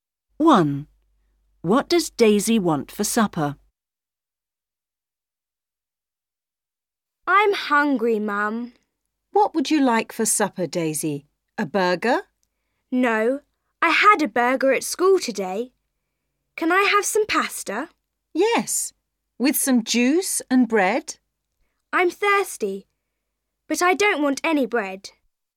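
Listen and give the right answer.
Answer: pasta and juice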